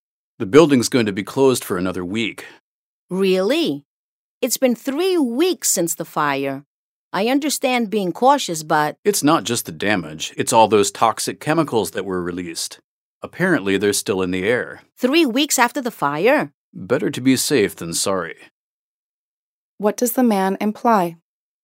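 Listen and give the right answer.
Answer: Keeping the building closed is a sensible precaution because of the toxic chemicals still in the air.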